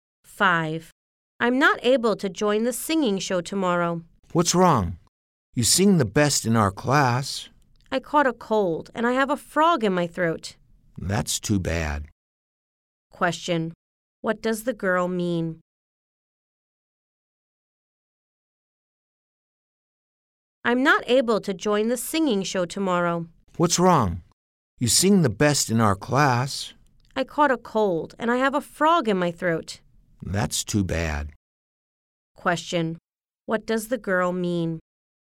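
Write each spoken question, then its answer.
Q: What does the girl mean?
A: She can't sing in the show because she has a cold and a sore throat.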